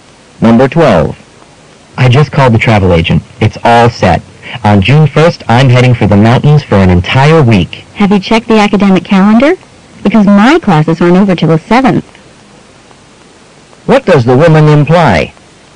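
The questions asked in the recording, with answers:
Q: What does the woman imply?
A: The man may have to change his travel date because classes continue until the 7th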